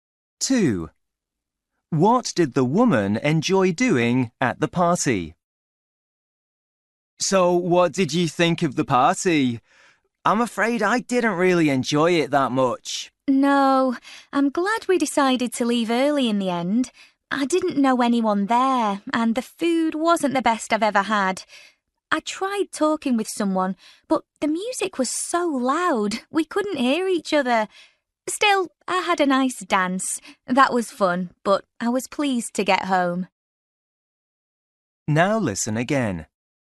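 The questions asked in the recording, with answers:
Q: What did the woman enjoy doing at the party?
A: Dancing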